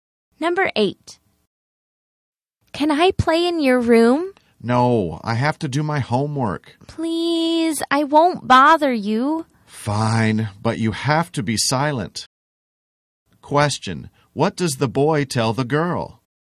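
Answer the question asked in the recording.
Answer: She can play in his room but has to be silent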